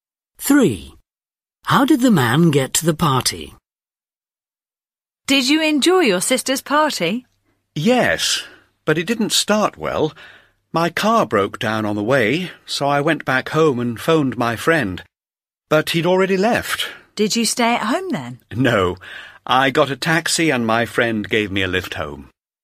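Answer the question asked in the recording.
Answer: by taxi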